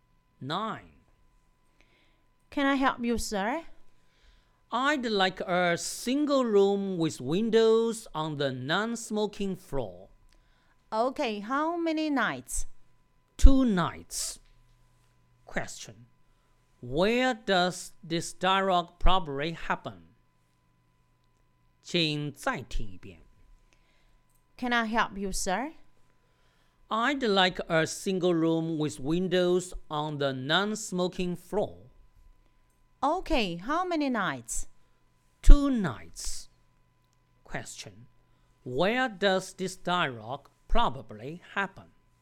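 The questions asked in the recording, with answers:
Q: where does this dialogue probably happen?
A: In a hotel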